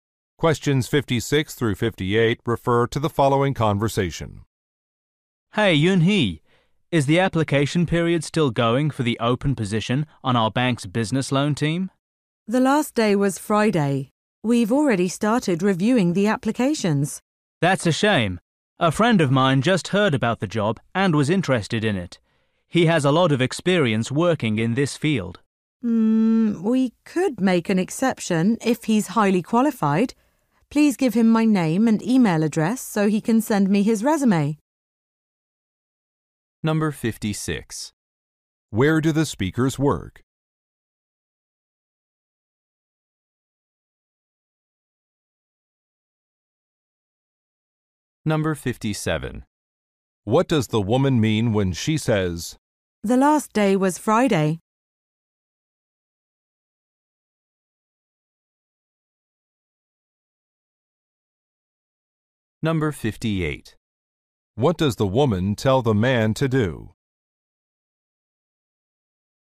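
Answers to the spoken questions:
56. At a bank
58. Give his friend her contact information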